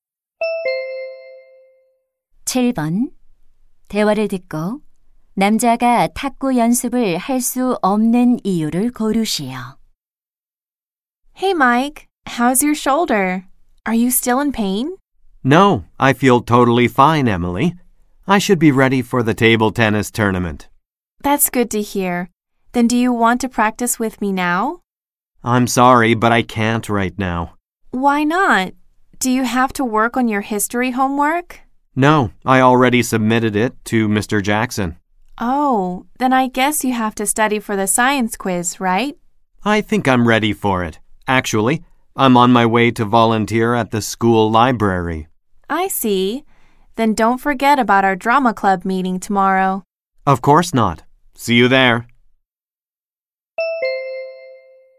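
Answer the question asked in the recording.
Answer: 학교 도서관에서 봉사활동을 해야 해서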